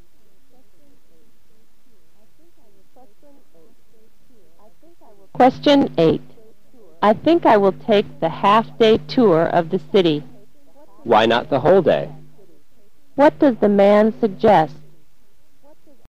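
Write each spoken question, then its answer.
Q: What does the man suggest?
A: Take the whole-day tour instead of the half-day tour.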